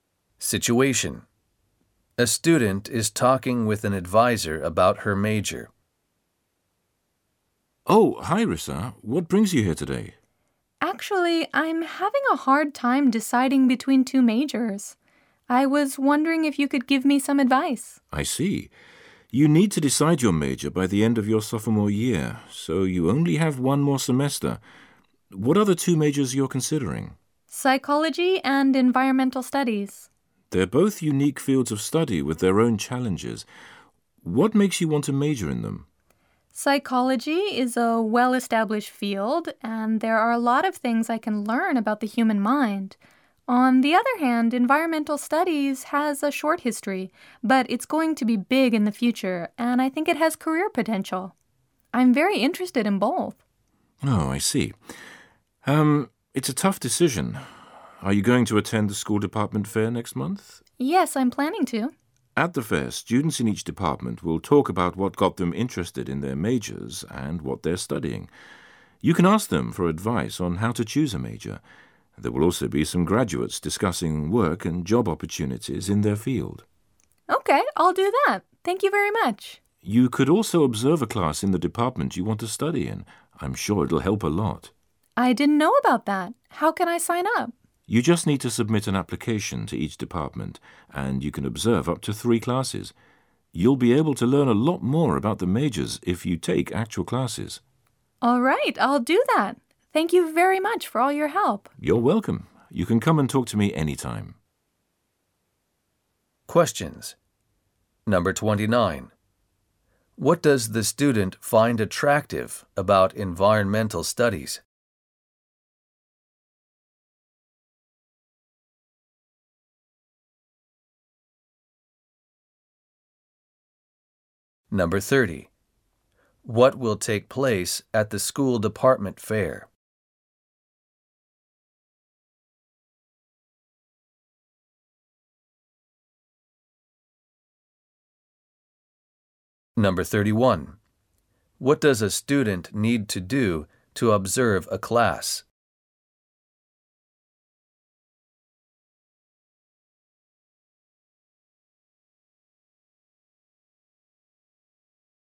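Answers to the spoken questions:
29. It will be big in the future and has career potential.
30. Students in each department will talk about their majors, and graduates will discuss job opportunities.
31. Submit an application to each department.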